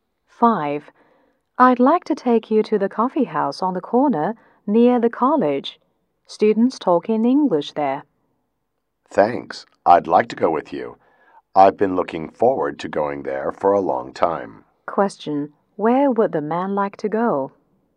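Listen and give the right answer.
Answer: The coffee house near the college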